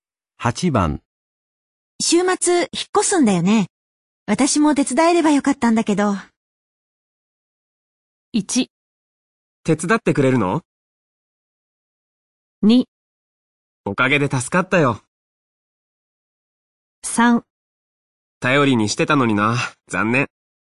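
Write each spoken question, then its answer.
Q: 週末引っ越すんだよね。私も手伝えればよかったんだけど。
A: 3: 頼りにしてたのにな、残念。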